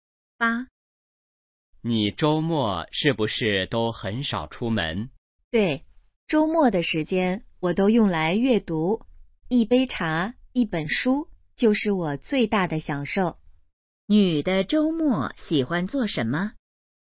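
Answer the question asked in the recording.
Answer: 阅读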